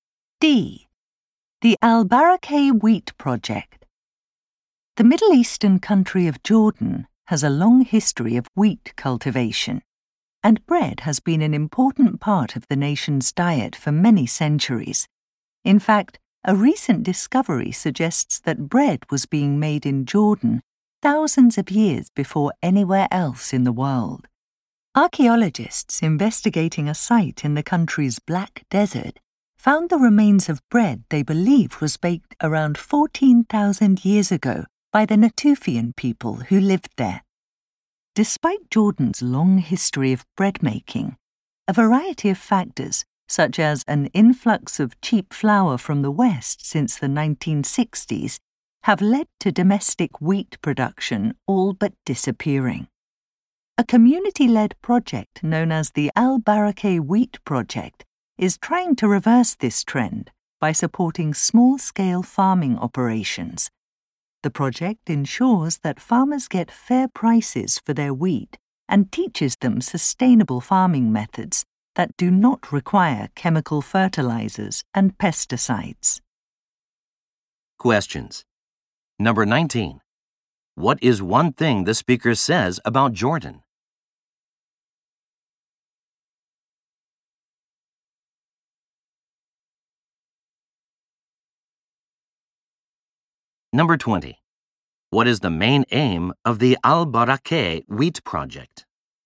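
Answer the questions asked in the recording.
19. Bread may have been made there thousands of years before anywhere else
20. To revive domestic wheat production by supporting small-scale farmers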